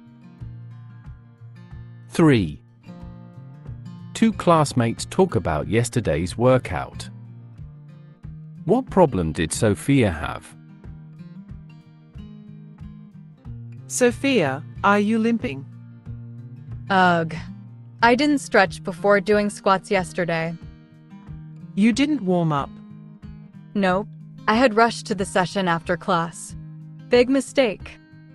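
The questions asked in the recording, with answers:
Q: What problem did Sophia have?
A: She was limping because she didn't stretch before squats.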